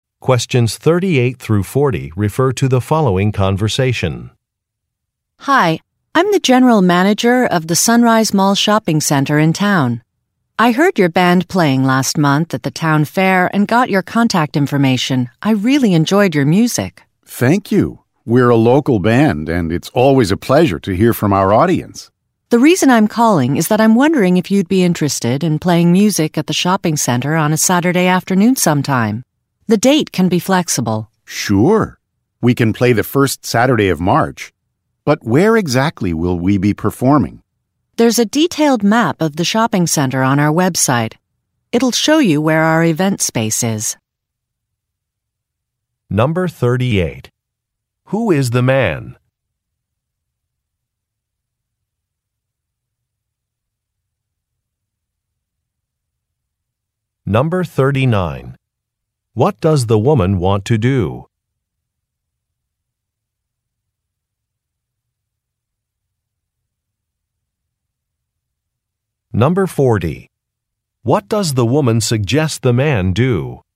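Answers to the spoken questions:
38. A musician in a local band
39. Book the band to play at the shopping center
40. Look at a map on the shopping center's website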